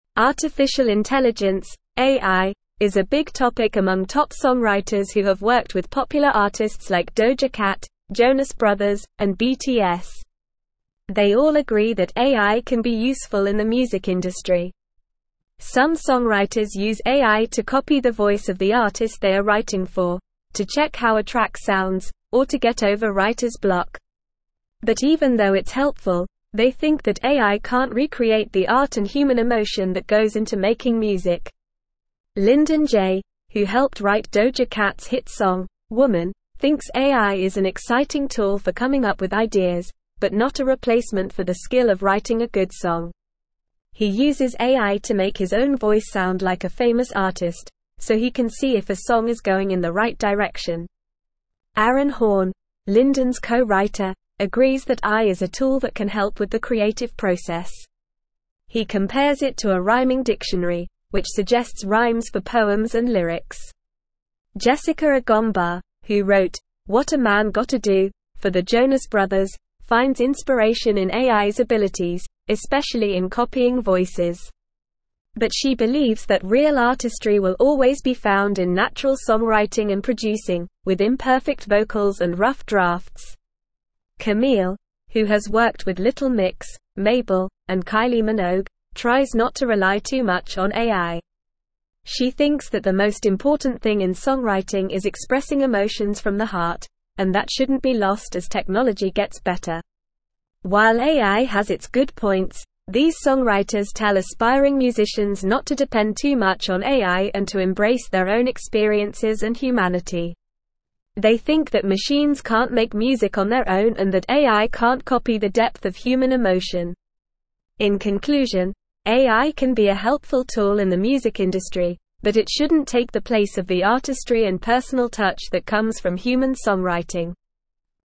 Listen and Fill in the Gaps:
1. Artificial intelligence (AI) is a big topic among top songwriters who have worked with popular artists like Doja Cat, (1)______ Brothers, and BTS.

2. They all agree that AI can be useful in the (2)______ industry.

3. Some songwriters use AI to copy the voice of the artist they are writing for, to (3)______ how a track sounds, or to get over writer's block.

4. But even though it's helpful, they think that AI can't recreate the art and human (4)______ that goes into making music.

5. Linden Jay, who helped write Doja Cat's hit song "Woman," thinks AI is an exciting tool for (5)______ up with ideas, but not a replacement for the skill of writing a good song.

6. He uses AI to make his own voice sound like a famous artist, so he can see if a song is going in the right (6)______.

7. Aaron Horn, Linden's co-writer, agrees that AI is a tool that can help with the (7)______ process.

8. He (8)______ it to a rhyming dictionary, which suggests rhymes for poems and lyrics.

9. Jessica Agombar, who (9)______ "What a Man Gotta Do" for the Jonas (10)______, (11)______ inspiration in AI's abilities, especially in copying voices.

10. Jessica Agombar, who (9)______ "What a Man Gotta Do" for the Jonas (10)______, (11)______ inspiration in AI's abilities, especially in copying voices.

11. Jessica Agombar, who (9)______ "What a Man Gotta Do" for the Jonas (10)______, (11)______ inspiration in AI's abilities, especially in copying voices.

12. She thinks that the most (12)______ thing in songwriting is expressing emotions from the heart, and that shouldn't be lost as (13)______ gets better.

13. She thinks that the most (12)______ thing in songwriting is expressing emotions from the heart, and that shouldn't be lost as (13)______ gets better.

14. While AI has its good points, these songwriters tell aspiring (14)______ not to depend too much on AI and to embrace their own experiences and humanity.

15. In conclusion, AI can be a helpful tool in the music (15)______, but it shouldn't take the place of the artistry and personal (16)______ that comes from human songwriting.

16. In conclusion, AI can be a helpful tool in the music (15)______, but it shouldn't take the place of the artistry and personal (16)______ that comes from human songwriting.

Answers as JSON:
{"1": "Jonas", "2": "music", "3": "check", "4": "emotion", "5": "coming", "6": "direction", "7": "creative", "8": "compares", "9": "wrote", "10": "Brothers", "11": "finds", "12": "important", "13": "technology", "14": "musicians", "15": "industry", "16": "touch"}

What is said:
Artificial intelligence (AI) is a big topic among top songwriters who have worked with popular artists like Doja Cat, Jonas Brothers, and BTS. They all agree that AI can be useful in the music industry. Some songwriters use AI to copy the voice of the artist they are writing for, to check how a track sounds, or to get over writer's block. But even though it's helpful, they think that AI can't recreate the art and human emotion that goes into making music.
Linden Jay, who helped write Doja Cat's hit song "Woman," thinks AI is an exciting tool for coming up with ideas, but not a replacement for the skill of writing a good song. He uses AI to make his own voice sound like a famous artist, so he can see if a song is going in the right direction. Aaron Horn, Linden's co-writer, agrees that AI is a tool that can help with the creative process. He compares it to a rhyming dictionary, which suggests rhymes for poems and lyrics.
Jessica Agombar, who wrote "What a Man Gotta Do" for the Jonas Brothers, finds inspiration in AI's abilities, especially in copying voices. But she believes that real artistry will always be found in natural songwriting and producing, with imperfect vocals and rough drafts. Kamille, who has worked with Little Mix, Mabel, and Kylie Minogue, tries not to rely too much on AI. She thinks that the most important thing in songwriting is expressing emotions from the heart, and that shouldn't be lost as technology gets better.
While AI has its good points, these songwriters tell aspiring musicians not to depend too much on AI and to embrace their own experiences and humanity. They think that machines can't make music on their own and that AI can't copy the depth of human emotion. In conclusion, AI can be a helpful tool in the music industry, but it shouldn't take the place of the artistry and personal touch that comes from human songwriting.

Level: Level 3